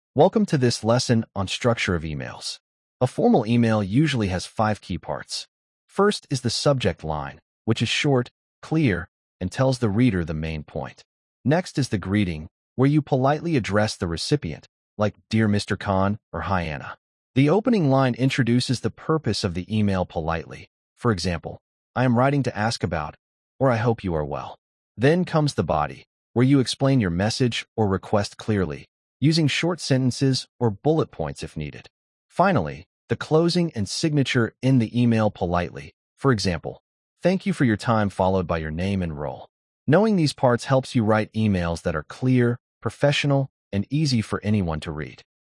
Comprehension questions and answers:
Complete the phrases as you listen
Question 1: A formal email usually has ______ key parts.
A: five

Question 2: First is the ____.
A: subject line

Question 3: Next is the greeting, where you politely address the ______.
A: recipient

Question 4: The opening line introduces the ______ of the email politely.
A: purpose

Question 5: Then comes the body, where you explain your message or ______ clearly.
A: request

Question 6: Finally, the closing and ______ end the email politely.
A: signature

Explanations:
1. A formal email usually has five key parts.
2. First is the subject line
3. Next is the greeting, where you politely address the recipient.
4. The opening line introduces the purpose of the email politely.
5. Then comes the body, where you explain your message or request clearly.
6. Finally, the closing and signature end the email politely.

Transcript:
Welcome to this lesson on structure of emails. A formal email usually has five key parts. First is the subject line, which is short, clear, and tells the reader the main point. Next is the greeting, where you politely address the recipient, like Dear Mr. Khan or Hi Anna. The opening line introduces the purpose of the email politely, for example, I am writing to ask about... or I hope you are well. Then comes the body, where you explain your message or request clearly, using short sentences or bullet points if needed. Finally, the closing and signature end the email politely, for example, Thank you for your time followed by your name and role. Knowing these parts helps you write emails that are clear, professional, and easy for anyone to read.